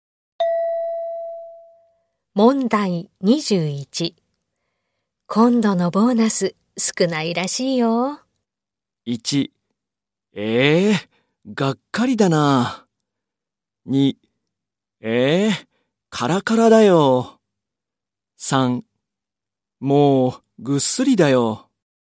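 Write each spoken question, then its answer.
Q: 今度のボーナス少ないらしいよ。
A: 1: がっかりだな。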